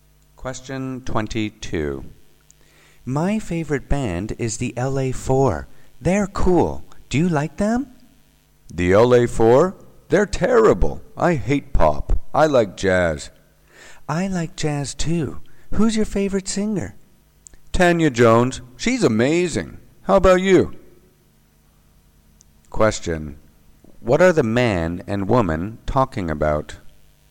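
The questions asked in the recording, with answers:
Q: What are the man and woman talking about?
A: Music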